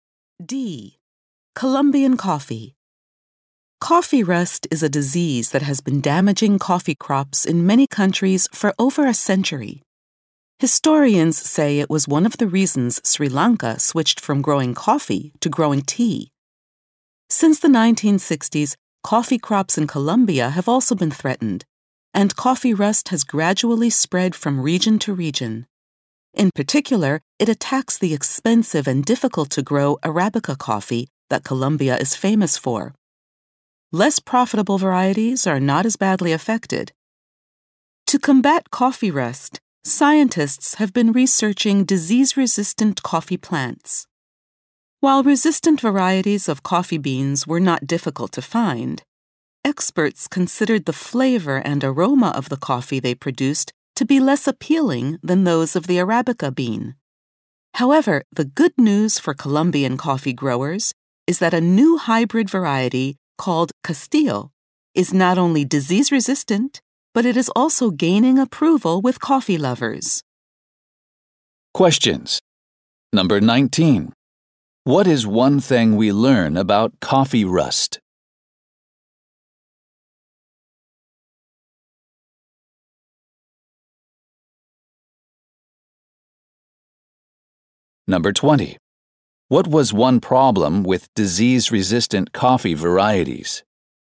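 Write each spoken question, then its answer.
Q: What is one thing we learn about coffee rust?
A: It especially attacks Arabica coffee

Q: What was one problem with disease-resistant coffee varieties?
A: Their flavor and aroma were less appealing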